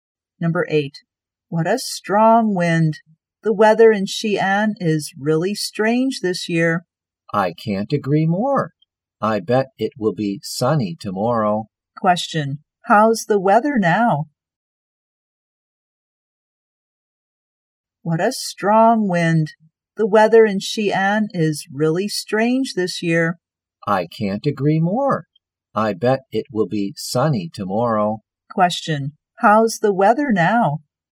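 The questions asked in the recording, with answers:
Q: How's the weather now?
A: Windy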